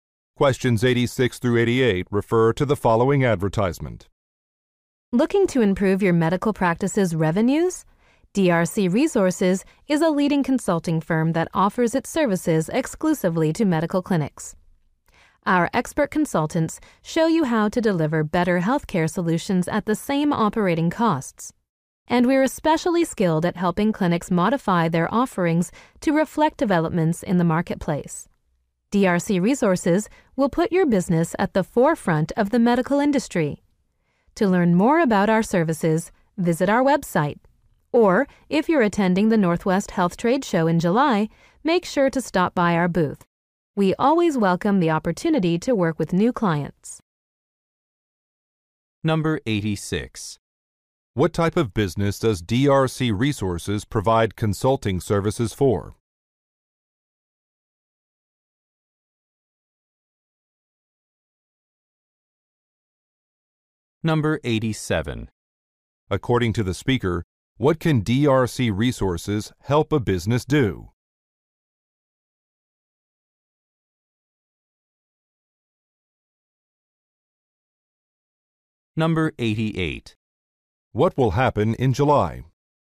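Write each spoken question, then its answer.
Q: What type of business does DRC Resources provide consulting services for?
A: Medical clinics

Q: According to the speaker, what can DRC Resources help a business do?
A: Adapt its offerings to market developments

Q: What will happen in July?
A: A health trade show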